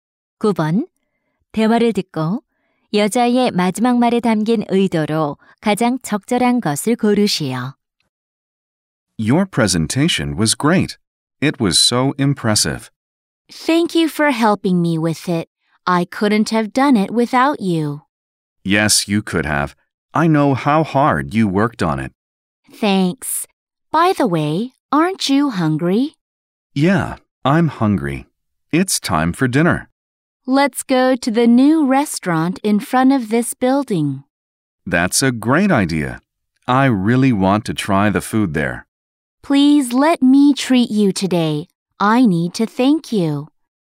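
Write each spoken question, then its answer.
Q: 대화를 듣고 여자의 마지막 말에 담긴 의도로 가장 적절한 것을 고르시오.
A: 감사의 표시로 저녁을 대접하려고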